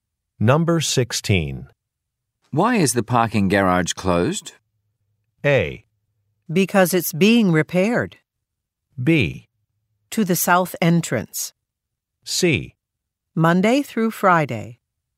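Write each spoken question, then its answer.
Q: Why is the parking garage closed?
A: A: Because it's being repaired.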